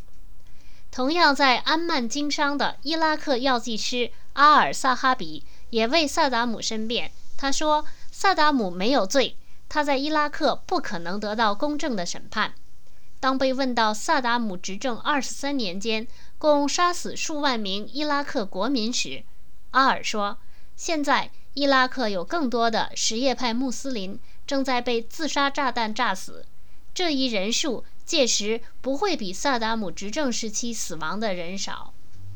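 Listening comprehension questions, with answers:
Please answer the following questions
伊拉克药剂师阿尔怎么描述伊拉克什叶派穆斯林的现状?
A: 现在有更多什叶派穆斯林正在被自杀炸弹炸死,人数不会比萨达姆执政时期死亡的少。

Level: 3rd Year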